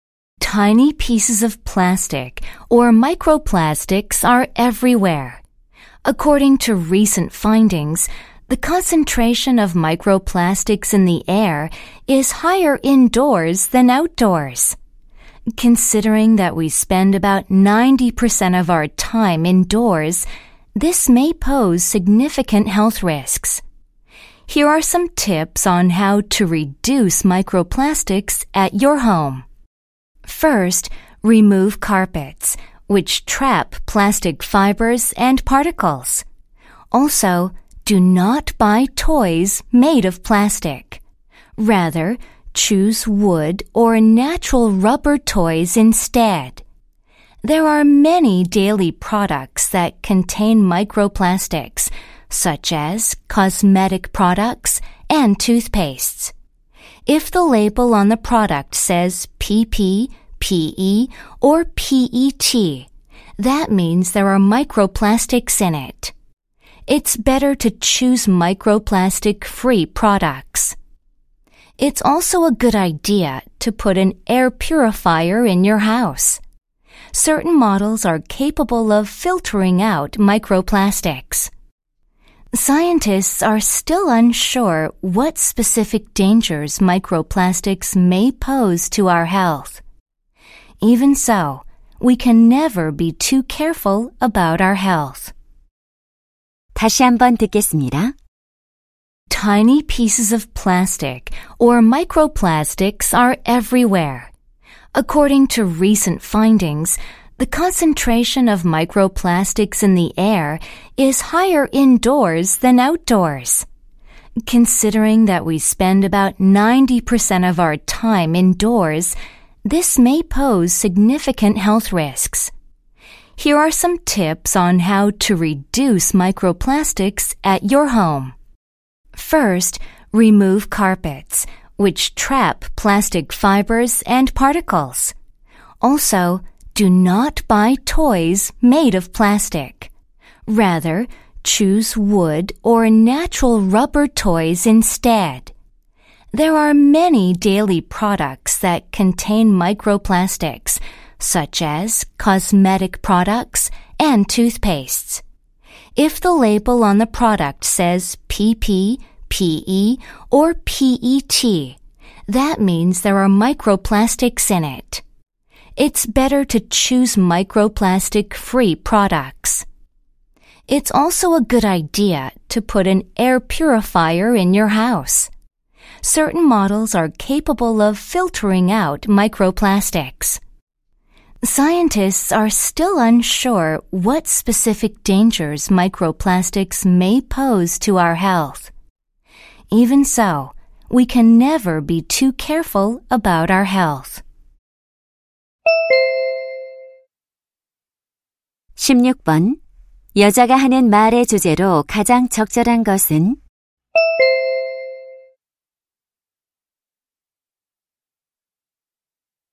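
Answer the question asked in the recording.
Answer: 가정에서 미세플라스틱을 줄이는 방법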